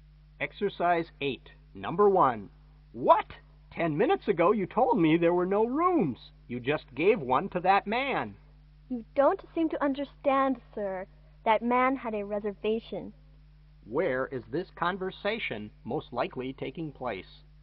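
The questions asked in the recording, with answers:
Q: Where is this conversation most likely taking place?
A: At a hotel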